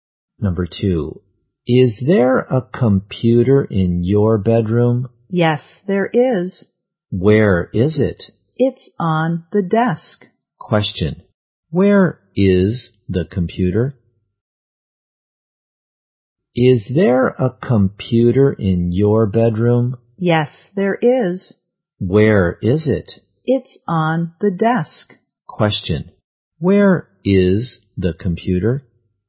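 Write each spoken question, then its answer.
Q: Question, where is the computer?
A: On the desk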